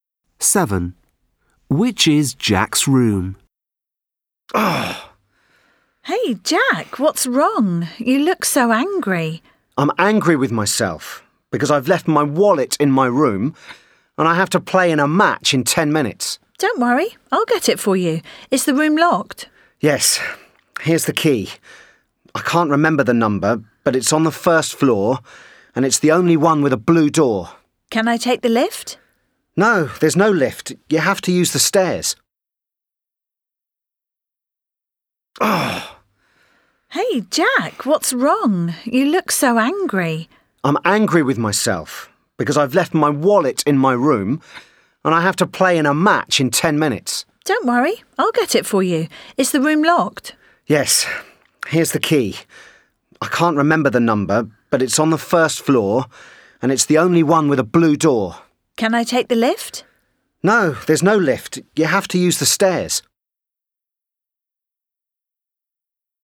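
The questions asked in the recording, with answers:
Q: Which is Jack's room?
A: The room on the first floor with a blue door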